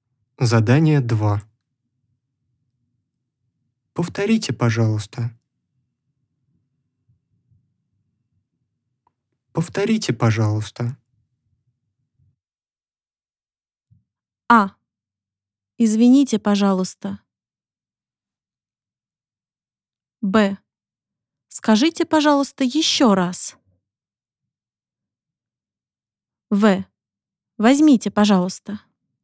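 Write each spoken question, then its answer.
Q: Повторите, пожалуйста.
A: Б: Скажите, пожалуйста, еще раз.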